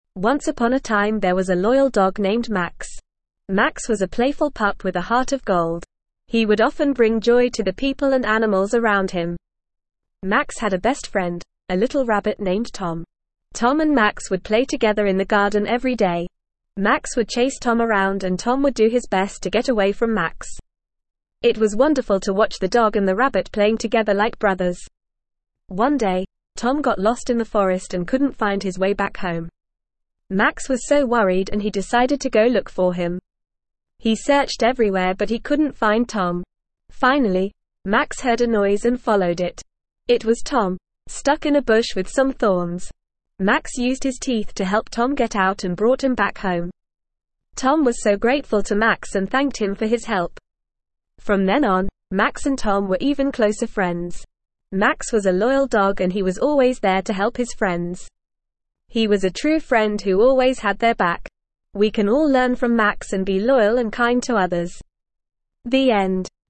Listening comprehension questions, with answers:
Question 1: Max was an incredibly _____ dog.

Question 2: Max and Tom would play together in the _____.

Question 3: Tom got lost in the _____ and Max went to look for him.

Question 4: Max used his _____ to help Tom get out of the bush.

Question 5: Tom thanked Max for his _____.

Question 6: Max was a true _____ who always had their back.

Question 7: We can all learn from Max to be _____ and kind to others.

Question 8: Max brought Tom _____ home.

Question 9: Max was a _____ pup with a heart of gold.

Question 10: What was the name of the loyal dog in the story?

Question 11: Who was Max's best friend?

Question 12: What happened to Tom one day?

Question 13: Where did Max find Tom?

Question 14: How did Max help Tom out of the bush?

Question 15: How did Tom thank Max for saving him?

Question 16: What lesson can we learn from Max's loyalty?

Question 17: What did Max and Tom do together in the garden every day?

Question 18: What noise did Max follow to find Tom in the forest?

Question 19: After Max saved Tom, how were their friendship even closer?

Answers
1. loyal
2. garden
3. forest
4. teeth
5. help
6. friend
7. loyal
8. back
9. playful
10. Max
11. Tom
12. He got lost in the forest.
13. In a bush with some thorns.
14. He used his teeth.
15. He was grateful and thanked him.
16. We can learn to be loyal and kind to others.
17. They would play together.
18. He heard a noise and followed it.
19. They were even closer friends.

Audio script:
Once upon a time there was a loyal dog named Max. Max was a playful pup with a heart of gold. He would often bring joy to the people and animals around him.
Max had a best friend, a little rabbit named Tom. Tom and Max would play together in the garden every day. Max would chase Tom around and Tom would do his best to get away from Max. It was wonderful to watch the dog and the rabbit playing together like brothers.
One day, Tom got lost in the forest and couldn't find his way back home. Max was so worried and he decided to go look for him. He searched everywhere but he couldn't find Tom.
Finally, Max heard a noise and followed it. It was Tom, stuck in a bush with some thorns! Max used his teeth to help Tom get out and brought him back home.
Tom was so grateful to Max and thanked him for his help. From then on, Max and Tom were even closer friends.
Max was a loyal dog and he was always there to help his friends. He was a true friend who always had their back. We can all learn from Max and be loyal and kind to others.
The end.

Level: Level 2